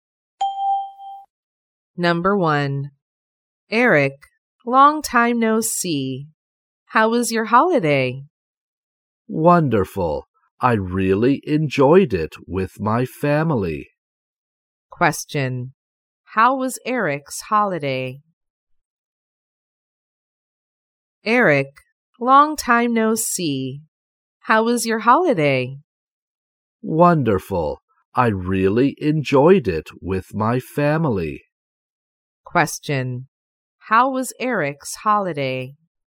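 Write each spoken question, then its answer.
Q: How was Eric's holiday?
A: Wonderful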